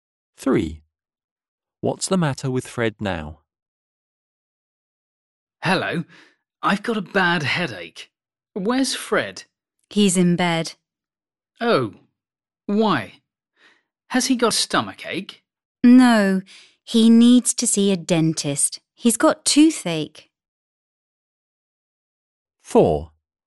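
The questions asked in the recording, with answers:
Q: What's the matter with Fred now?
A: He's got toothache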